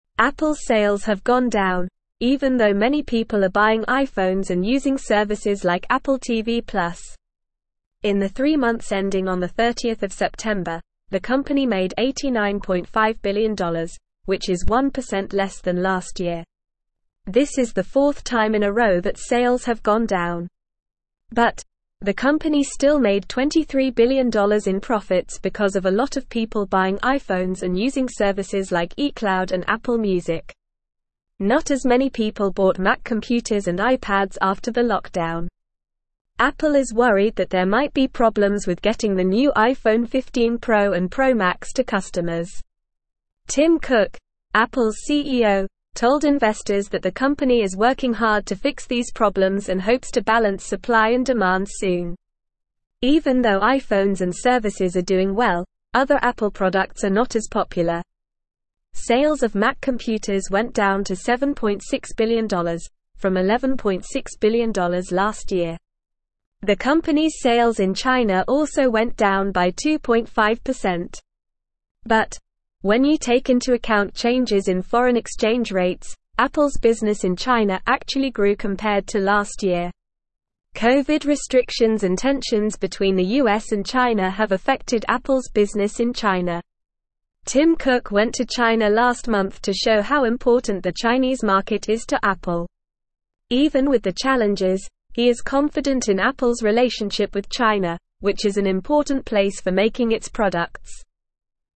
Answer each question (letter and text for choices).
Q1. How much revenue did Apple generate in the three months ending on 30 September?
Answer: Apple made $89.5 billion in revenue during the three months ending on 30 September.

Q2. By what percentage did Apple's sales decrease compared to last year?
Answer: Apple's sales decreased by 1% compared to last year.

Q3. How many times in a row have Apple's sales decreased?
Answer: This is the fourth consecutive time that Apple's sales have decreased.

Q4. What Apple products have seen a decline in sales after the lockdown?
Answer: Sales of Mac computers and iPads have declined after the lockdown.

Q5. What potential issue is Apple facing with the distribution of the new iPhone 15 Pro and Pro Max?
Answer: Apple is concerned about possible difficulties in delivering the new iPhone 15 Pro and Pro Max to customers.

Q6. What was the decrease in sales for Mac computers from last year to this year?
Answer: Sales of Mac computers dropped from $11.6 billion last year to $7.6 billion this year.

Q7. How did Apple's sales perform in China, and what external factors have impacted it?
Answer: Apple's sales in China went down by 2.5%, but when accounting for foreign exchange rate changes, they actually grew.

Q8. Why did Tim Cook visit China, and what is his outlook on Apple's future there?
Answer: Tim Cook visited China to demonstrate the importance of the Chinese market to Apple.

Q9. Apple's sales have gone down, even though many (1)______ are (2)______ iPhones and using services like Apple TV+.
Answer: people

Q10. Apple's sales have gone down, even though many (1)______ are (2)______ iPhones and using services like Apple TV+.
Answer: buying

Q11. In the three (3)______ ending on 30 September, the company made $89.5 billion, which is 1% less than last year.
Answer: months

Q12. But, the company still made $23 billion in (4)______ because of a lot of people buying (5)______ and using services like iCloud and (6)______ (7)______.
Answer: profits

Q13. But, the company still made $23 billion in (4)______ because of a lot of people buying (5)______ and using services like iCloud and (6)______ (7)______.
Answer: iPhones

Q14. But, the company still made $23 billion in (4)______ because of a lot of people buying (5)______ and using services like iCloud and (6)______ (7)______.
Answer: Apple

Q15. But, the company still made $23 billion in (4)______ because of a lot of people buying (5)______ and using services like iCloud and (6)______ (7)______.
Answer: Music

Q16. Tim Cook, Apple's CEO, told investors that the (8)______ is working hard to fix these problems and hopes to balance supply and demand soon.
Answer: company

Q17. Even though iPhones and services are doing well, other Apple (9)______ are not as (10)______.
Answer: products

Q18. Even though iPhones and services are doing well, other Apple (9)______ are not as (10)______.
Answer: popular

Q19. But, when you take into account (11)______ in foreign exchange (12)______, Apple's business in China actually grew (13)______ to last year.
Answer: changes

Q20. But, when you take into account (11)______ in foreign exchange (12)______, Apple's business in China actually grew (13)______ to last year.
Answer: rates

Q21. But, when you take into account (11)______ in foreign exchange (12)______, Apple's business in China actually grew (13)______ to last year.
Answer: compared

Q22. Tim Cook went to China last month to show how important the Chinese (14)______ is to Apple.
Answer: market

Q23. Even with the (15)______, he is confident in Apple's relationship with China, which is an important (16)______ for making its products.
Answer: challenges

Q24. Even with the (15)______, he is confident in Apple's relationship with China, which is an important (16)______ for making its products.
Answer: place

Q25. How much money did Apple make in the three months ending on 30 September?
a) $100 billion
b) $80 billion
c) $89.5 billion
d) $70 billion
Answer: c) $89.5 billion

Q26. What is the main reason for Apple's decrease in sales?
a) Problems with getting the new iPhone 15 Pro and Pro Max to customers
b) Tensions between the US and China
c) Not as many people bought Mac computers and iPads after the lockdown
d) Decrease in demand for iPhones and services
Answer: c) Not as many people bought Mac computers and iPads after the lockdown

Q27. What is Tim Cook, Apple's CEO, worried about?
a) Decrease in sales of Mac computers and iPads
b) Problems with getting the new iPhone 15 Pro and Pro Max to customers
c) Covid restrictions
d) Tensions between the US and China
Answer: b) Problems with getting the new iPhone 15 Pro and Pro Max to customers

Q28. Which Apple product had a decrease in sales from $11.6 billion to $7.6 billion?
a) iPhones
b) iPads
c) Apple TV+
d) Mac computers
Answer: d) Mac computers

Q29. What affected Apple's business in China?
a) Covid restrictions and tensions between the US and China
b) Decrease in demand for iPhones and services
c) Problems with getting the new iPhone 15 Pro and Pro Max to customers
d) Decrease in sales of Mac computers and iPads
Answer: a) Covid restrictions and tensions between the US and China

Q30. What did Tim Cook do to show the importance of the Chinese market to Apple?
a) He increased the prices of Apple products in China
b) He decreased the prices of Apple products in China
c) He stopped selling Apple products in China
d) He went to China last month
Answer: d) He went to China last month

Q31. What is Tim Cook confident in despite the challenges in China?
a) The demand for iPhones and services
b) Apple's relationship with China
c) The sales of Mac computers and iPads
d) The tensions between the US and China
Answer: b) Apple's relationship with China

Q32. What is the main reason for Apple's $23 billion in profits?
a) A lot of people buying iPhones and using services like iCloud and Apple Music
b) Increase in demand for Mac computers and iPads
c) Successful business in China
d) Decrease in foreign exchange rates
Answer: a) A lot of people buying iPhones and using services like iCloud and Apple Music

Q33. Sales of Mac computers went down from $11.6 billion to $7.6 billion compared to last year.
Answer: True

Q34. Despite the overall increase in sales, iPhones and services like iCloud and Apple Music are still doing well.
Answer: False

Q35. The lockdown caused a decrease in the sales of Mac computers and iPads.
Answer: True

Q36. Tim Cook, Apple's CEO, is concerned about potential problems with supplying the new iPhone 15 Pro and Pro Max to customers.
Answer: True

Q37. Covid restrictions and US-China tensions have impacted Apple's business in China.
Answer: True

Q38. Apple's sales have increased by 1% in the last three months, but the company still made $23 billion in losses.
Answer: False

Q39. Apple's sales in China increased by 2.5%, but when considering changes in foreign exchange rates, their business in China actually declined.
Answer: False

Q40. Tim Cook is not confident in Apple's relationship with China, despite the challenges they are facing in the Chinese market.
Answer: False

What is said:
Apple's sales have gone down, even though many people are buying iPhones and using services like Apple TV+. In the three months ending on 30 September, the company made $89.5 billion, which is 1% less than last year. This is the fourth time in a row that sales have gone down. But, the company still made $23 billion in profits because of a lot of people buying iPhones and using services like iCloud and Apple Music.
Apple is worried that there might be problems with getting the new iPhone 15 Pro and Pro Max to customers. Tim Cook, Apple's CEO, told investors that the company is working hard to fix these problems and hopes to balance supply and demand soon.
Even though iPhones and services are doing well, other Apple products are not as popular. Sales of Mac computers went down to $7.6 billion, from $11.6 billion last year. The company's sales in China also went down by 2.5%. But, when you take into account changes in foreign exchange rates, Apple's business in China actually grew compared to last year.
Covid restrictions and tensions between the US and China have affected Apple's business in China. Tim Cook went to China last month to show how important the Chinese market is to Apple. Even with the challenges, he is confident in Apple's relationship with China, which is an important place for making its products.

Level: Level 3